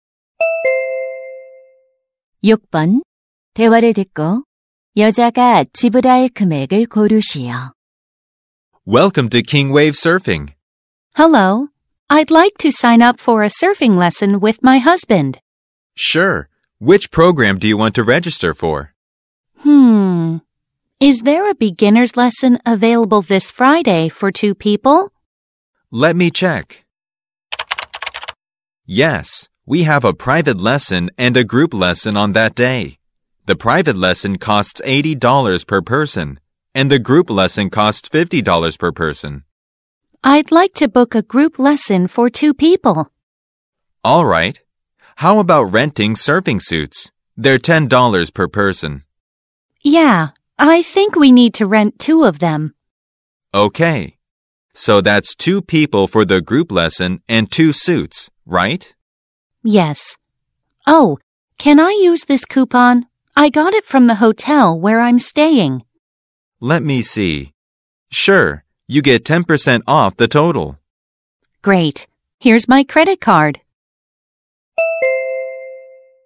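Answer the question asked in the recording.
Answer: 108달러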